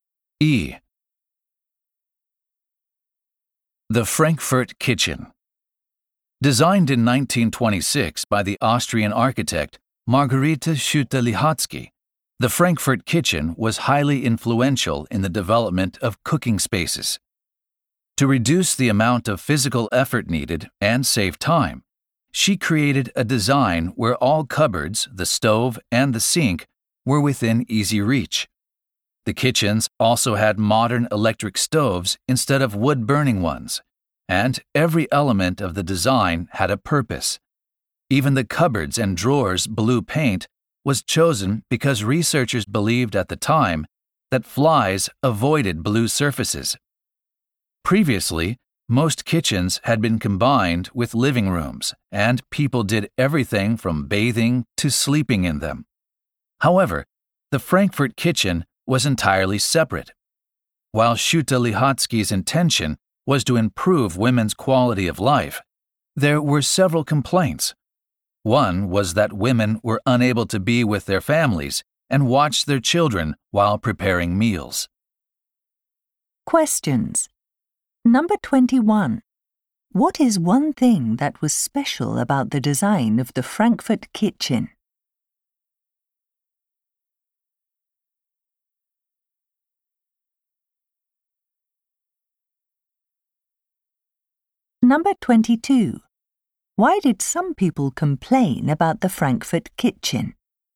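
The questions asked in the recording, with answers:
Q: Why did some people complain about the Frankfurt Kitchen?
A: Women couldn't be with their families and watch children while cooking.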